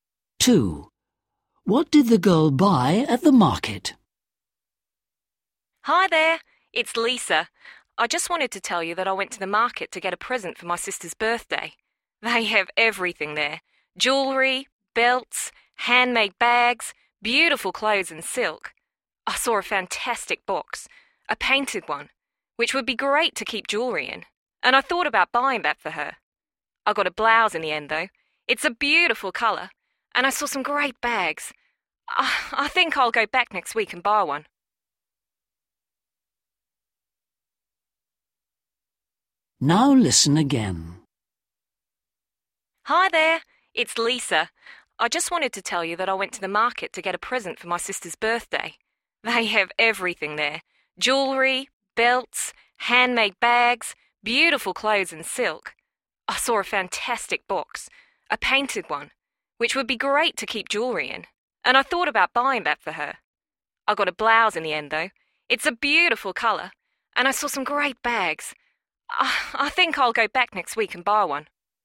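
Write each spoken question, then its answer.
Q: What did the girl buy at the market?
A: A blouse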